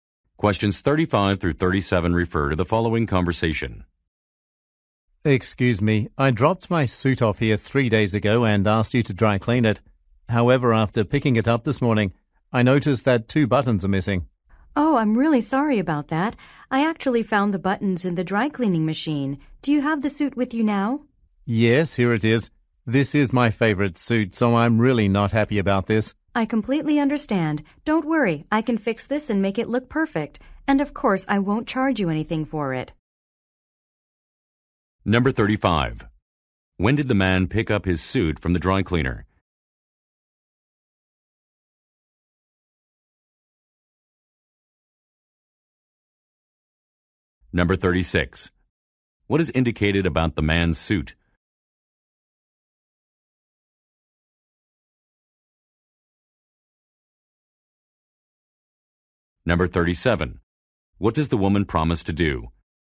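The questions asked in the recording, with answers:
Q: When did the man pick up his suit from the dry cleaner?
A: This morning

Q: What is indicated about the man's suit?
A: Two buttons are missing

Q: What does the woman promise to do?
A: Fix the suit for free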